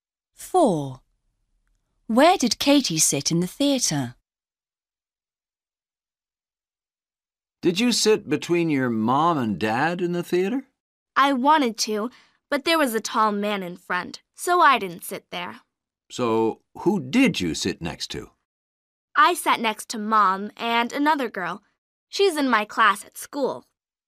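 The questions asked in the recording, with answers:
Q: Where did Katie sit in the theater?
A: Next to her mom and another girl from her class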